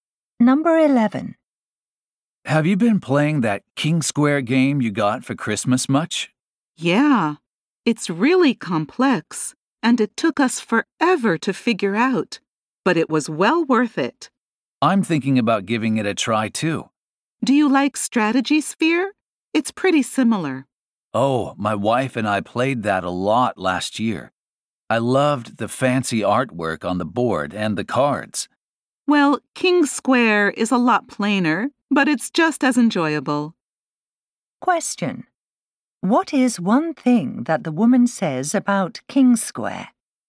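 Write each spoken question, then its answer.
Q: What is one thing that the woman says about King Square?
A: It is plainer than Strategy Sphere but just as enjoyable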